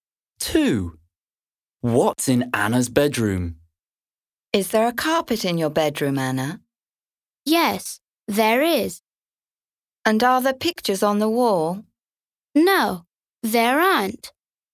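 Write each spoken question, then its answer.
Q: What's in Anna's bedroom?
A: A carpet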